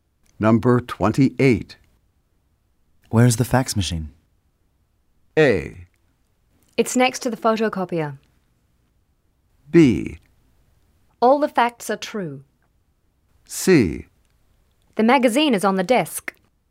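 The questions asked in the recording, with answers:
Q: Where's the fax machine?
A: A: It's next to the photocopier.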